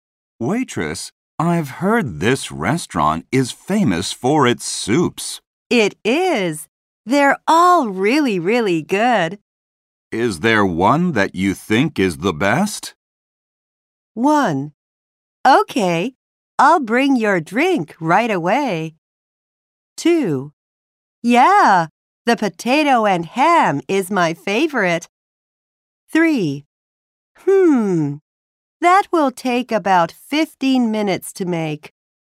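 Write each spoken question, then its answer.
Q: Is there one that you think is the best?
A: 2: Yeah, the potato and ham is my favorite.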